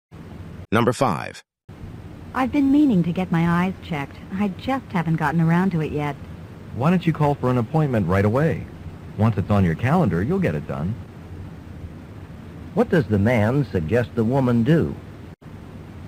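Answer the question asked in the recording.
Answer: Call for an eye appointment right away.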